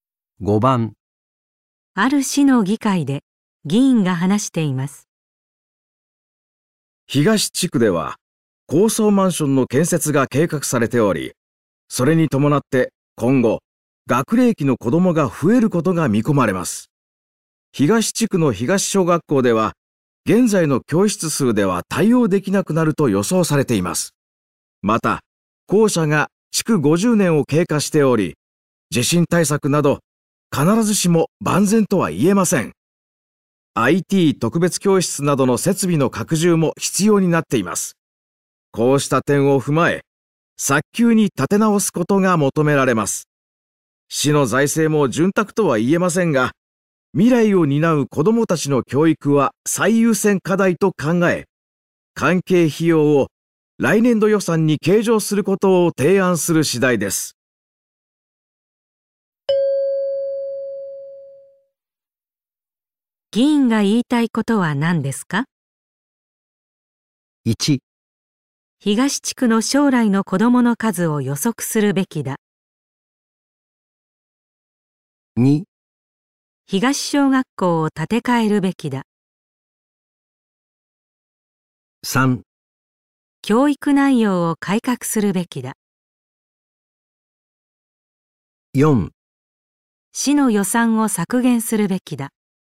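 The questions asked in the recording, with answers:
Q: 議員が言いたいことは何ですか?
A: 2: 東小学校を建て替えるべきだ。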